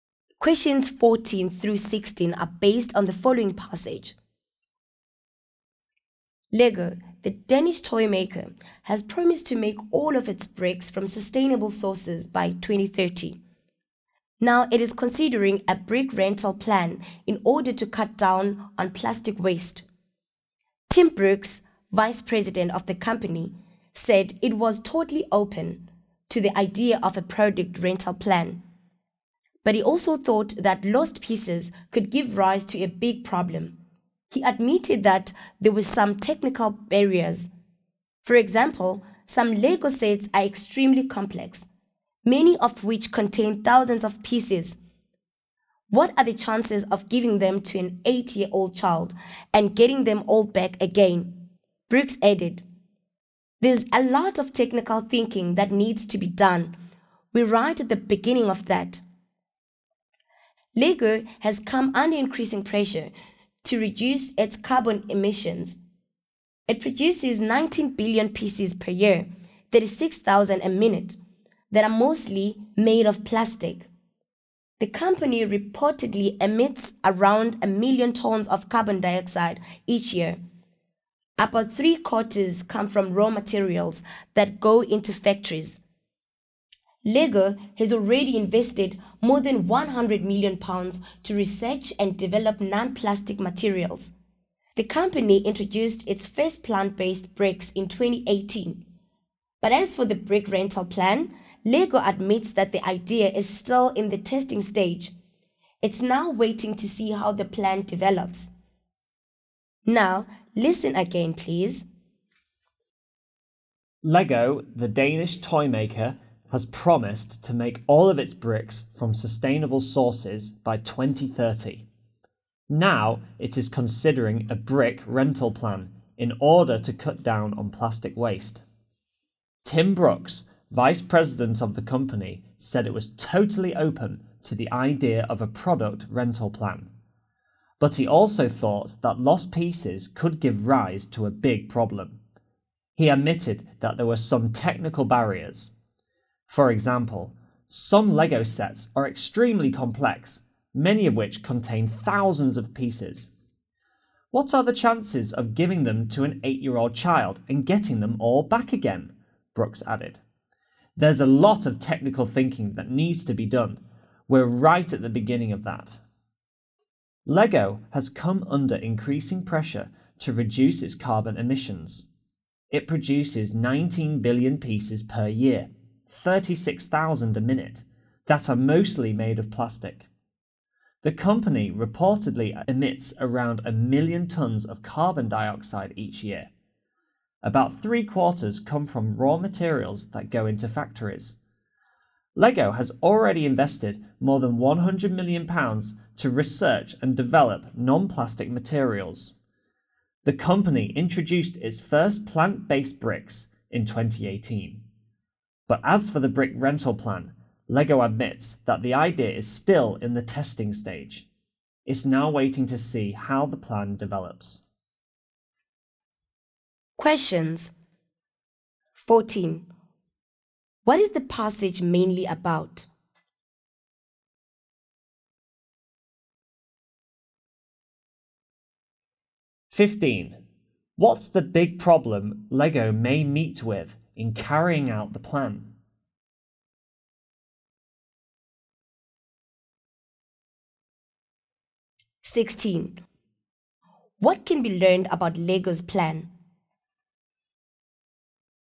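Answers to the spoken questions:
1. Lego's brick rental plan to cut plastic waste
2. Lost pieces
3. It is still in the testing stage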